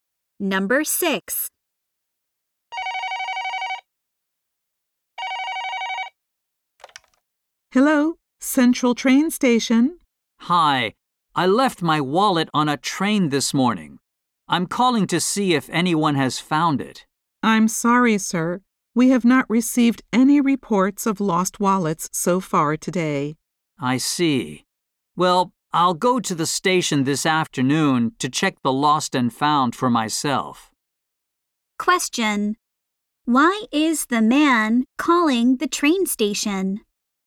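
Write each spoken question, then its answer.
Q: Why is the man calling the train station?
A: He left his wallet on a train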